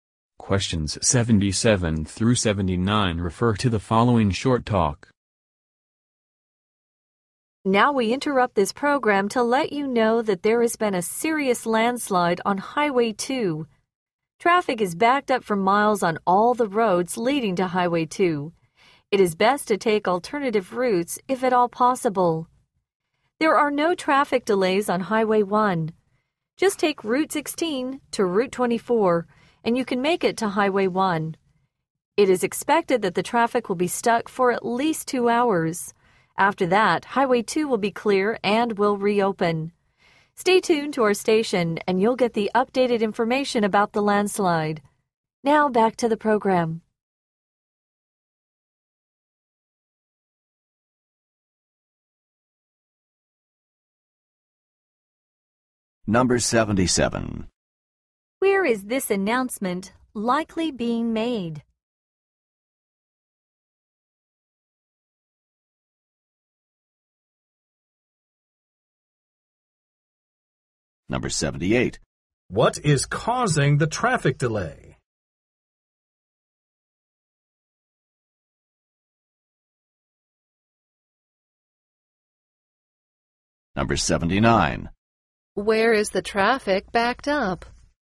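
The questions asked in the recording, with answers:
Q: Where is this announcement likely being made?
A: On the radio

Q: What is causing the traffic delay?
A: A landslide on Highway 2

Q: Where is the traffic backed up?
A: On all the roads leading to Highway 2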